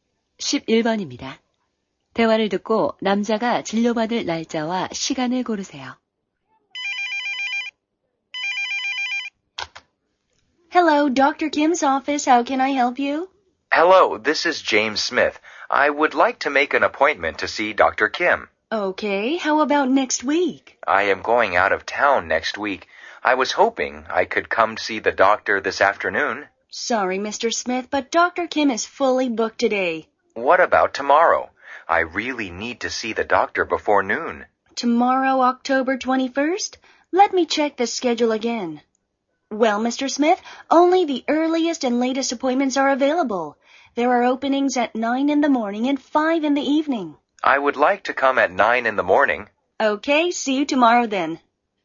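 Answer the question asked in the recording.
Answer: 10월 21일 오전 9시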